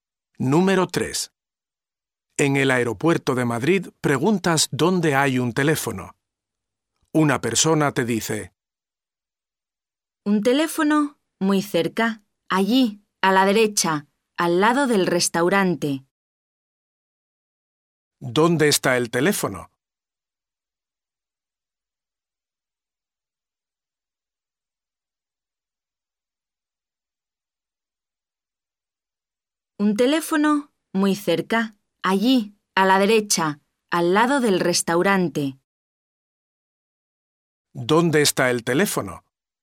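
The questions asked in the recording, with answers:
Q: ¿Dónde está el teléfono?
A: A la derecha, al lado del restaurante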